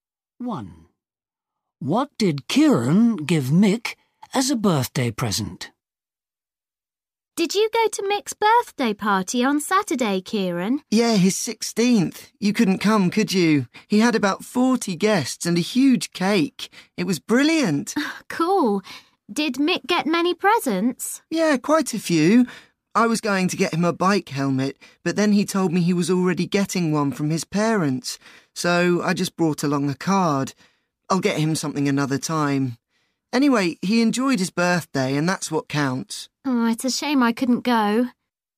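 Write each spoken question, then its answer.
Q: What did Kieran give Mick as a birthday present?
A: a card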